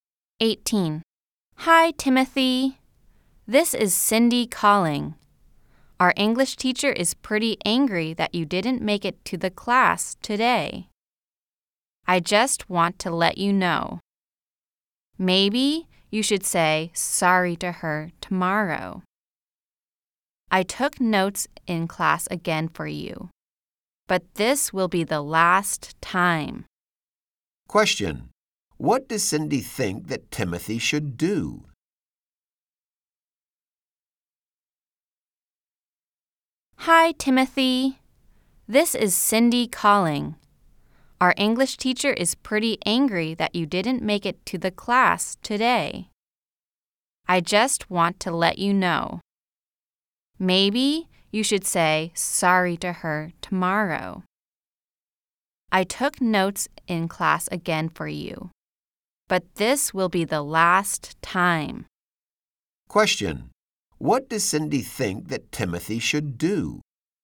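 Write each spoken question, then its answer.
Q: What does Cindy think that Timothy should do?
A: Say sorry to the English teacher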